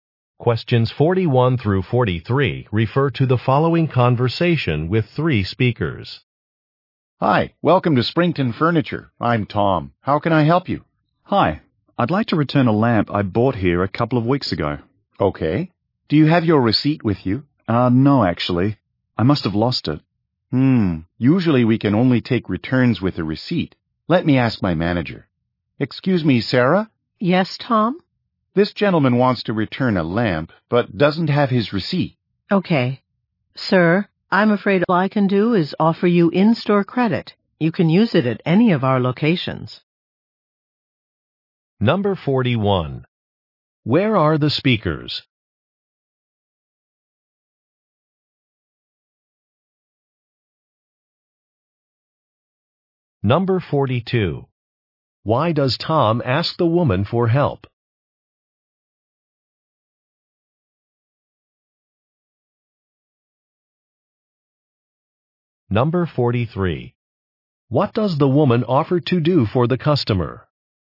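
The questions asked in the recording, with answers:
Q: Where are the speakers?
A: At a furniture store

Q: Why does Tom ask the woman for help?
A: The customer has no receipt for his return

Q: What does the woman offer to do for the customer?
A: Give him in-store credit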